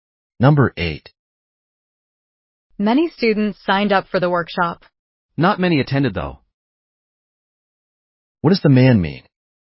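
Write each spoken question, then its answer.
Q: What does the man mean?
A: Few of the students who signed up attended the workshop.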